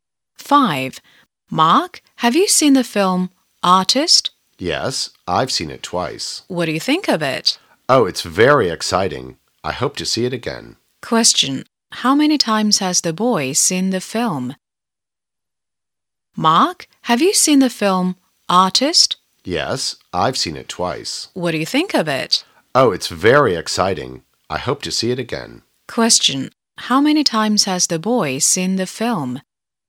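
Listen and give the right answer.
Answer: Twice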